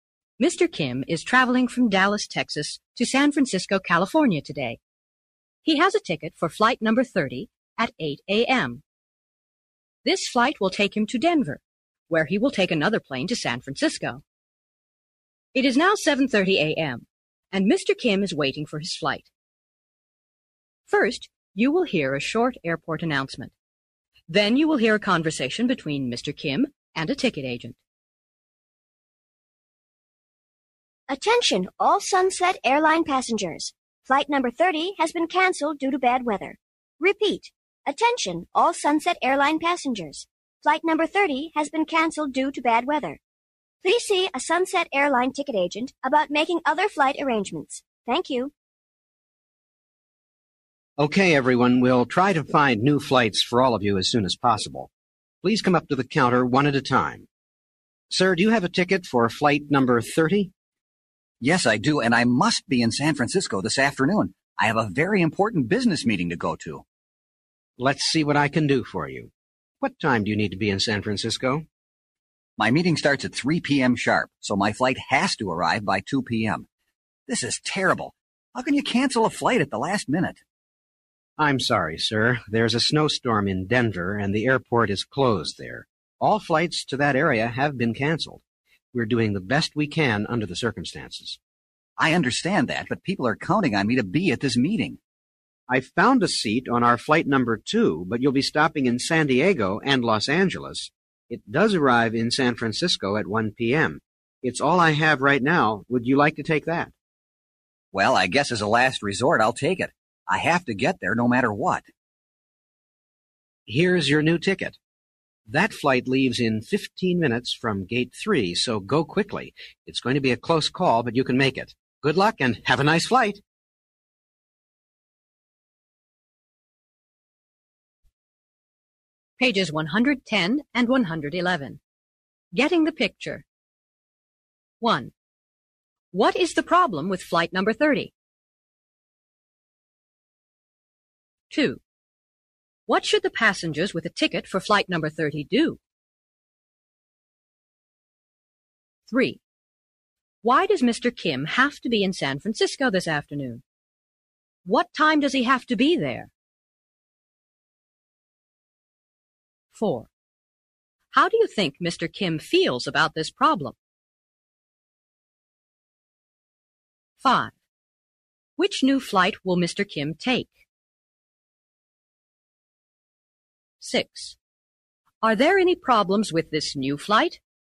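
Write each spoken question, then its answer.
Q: What is the problem with flight number 30?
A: It has been canceled due to bad weather (a snowstorm in Denver).

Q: What should the passengers with a ticket for flight number 30 do?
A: See a Sunset Airline ticket agent about making other flight arrangements.

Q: Why does Mr. Kim have to be in San Francisco this afternoon?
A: He has a very important business meeting.

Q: What time does he have to be there?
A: By 2 p.m. (the meeting starts at 3 p.m. sharp)

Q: Which new flight will Mr. Kim take?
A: Flight number 2

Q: Are there any problems with this new flight?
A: Yes, it stops in San Diego and Los Angeles and leaves in 15 minutes, so he must hurry.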